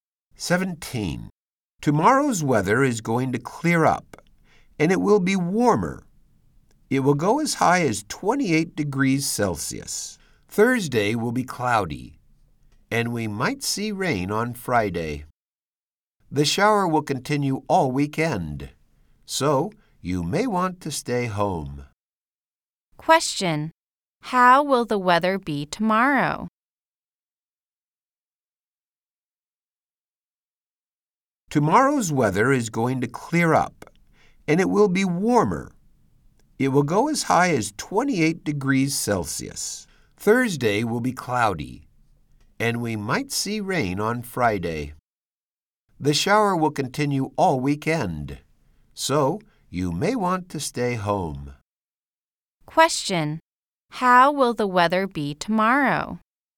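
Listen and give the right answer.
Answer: Clear and warmer, up to 28 degrees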